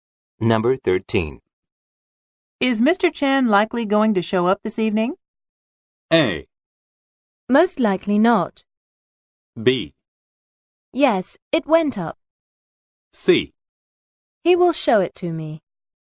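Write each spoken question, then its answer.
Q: Is Mr. Chen likely going to show up this evening?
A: A: Most likely not.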